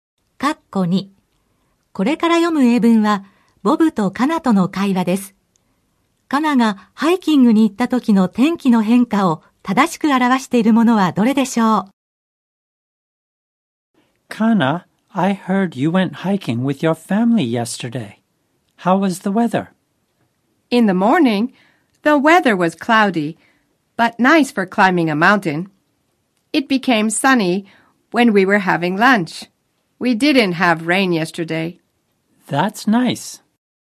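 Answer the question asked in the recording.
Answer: 朝はくもり、昼食の時に晴れた(雨は降らなかった)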